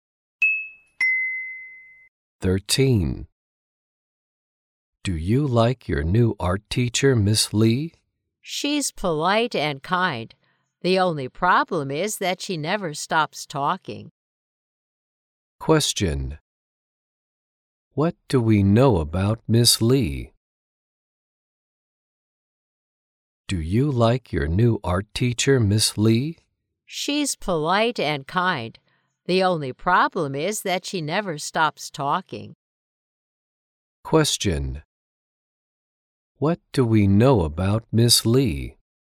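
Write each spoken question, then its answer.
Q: What do we know about Miss Lee?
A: She's polite and kind but never stops talking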